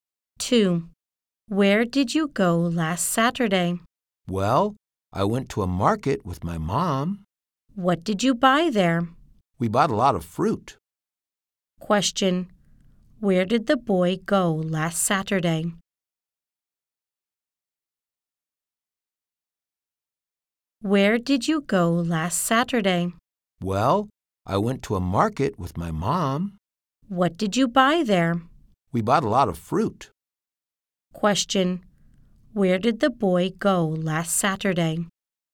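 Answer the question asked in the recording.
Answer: To a market with his mom.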